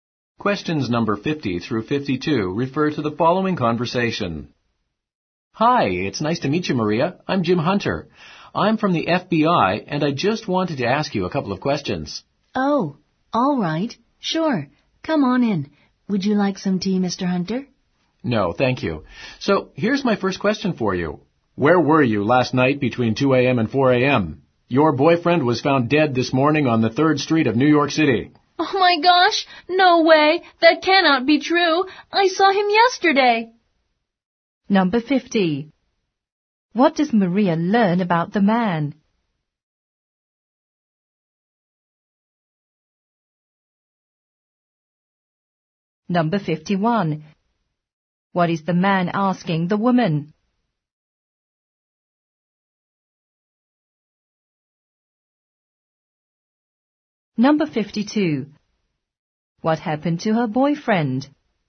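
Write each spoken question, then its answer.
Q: What is the man asking the woman?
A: Where she was last night between 2 and 4 a.m.

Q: What happened to her boyfriend?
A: He was found dead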